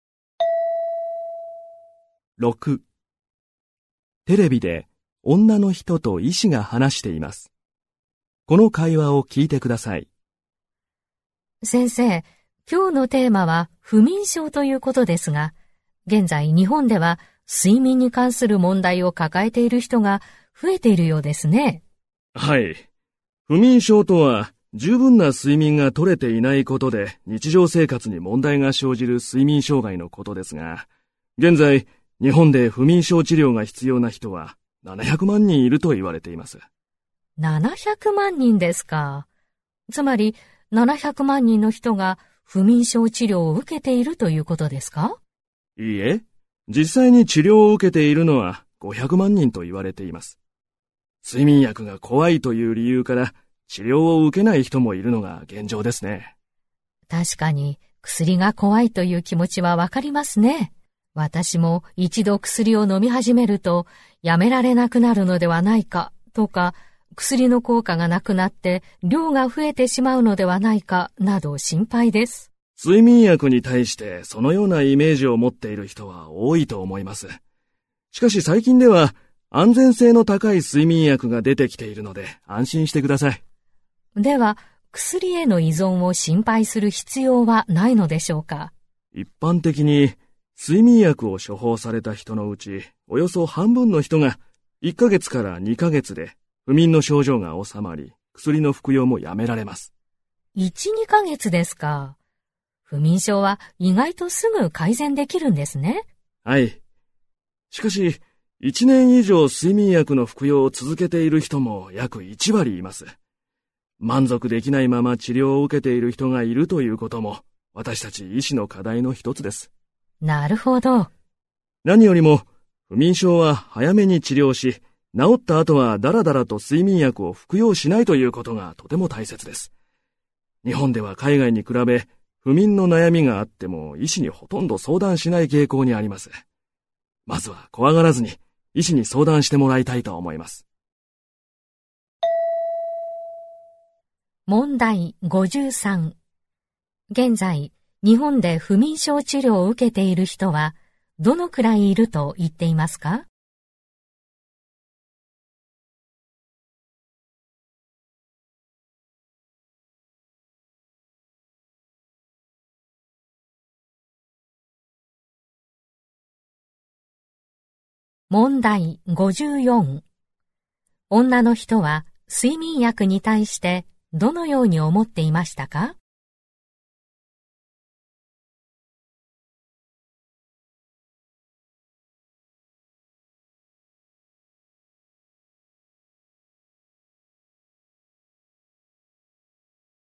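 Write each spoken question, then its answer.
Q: 現在、日本で不眠症治療を受けている人はどのくらいいると言っていますか?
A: 500万人

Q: 女の人は睡眠薬に対してどのように思っていましたか?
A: 飲み始めるとやめられなくなる、量が増えるのではと心配で怖い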